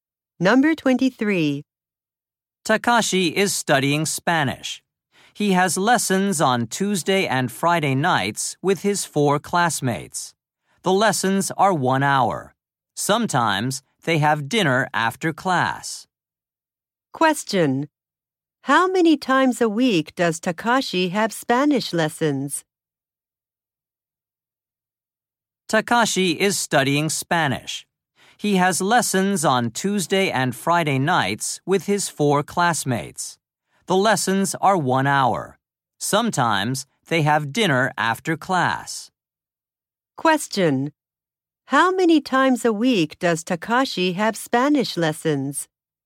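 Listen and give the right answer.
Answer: Twice.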